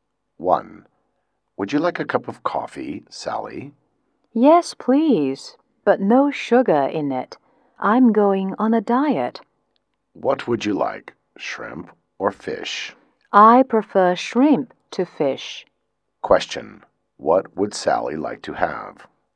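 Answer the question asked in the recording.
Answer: Coffee without sugar and shrimp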